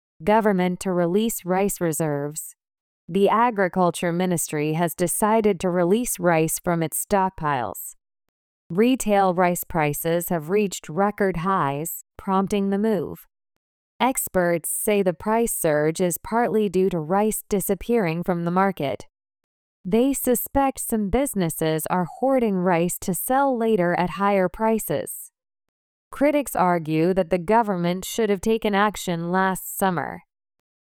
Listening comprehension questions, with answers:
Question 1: The agriculture ministry has ( ).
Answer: decided to release rice from its stockpiles

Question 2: Retail rice prices have reached record highs, ( ).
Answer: prompting the move

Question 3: Experts say the price surge is partly due to ( ).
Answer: rice disappearing from the market

次の各質問の答えを探しながら聞きましょう。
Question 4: Why has the agriculture ministry decided to release rice from its stockpiles?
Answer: Because retail rice prices have reached record highs.

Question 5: What do experts suspect?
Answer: They suspect some businesses are hoarding rice to sell later at higher prices.

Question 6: How do critics blame the government?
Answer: They argue that the government should have taken action last summer.

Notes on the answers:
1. 「from its」と子音+母音のリンキングになるため、弱音の機能語がやや聞き取りにくい箇所です。 「its(代名詞「it」の所有格)」=「the government's(政府の)」を表しています。
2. 「the move(その対応)」は直前で述べた「農水省による備蓄米の放出」を指しています。 特定の対応を指しているため、定冠詞「the」を付けるのが自然です。
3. 「the market(その市場)」 とは「米の市場」を指しています。特定の市場なので、定冠詞「the」を付けます。また、「market」は可算名詞なので無冠詞・単数にはなりません。

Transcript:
Government to Release Rice Reserves
The agriculture ministry has decided to release rice from its stockpiles.
Retail rice prices have reached record highs, prompting the move.
Experts say the price surge is partly due to rice disappearing from the market.
They suspect some businesses are hoarding rice to sell later at higher prices.
Critics argue that the government should have taken action last summer.

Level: 中級脱出